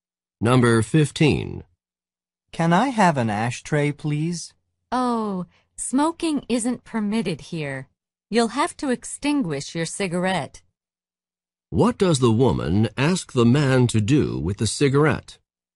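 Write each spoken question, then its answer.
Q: What does the woman ask the man to do with the cigarette?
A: Put it out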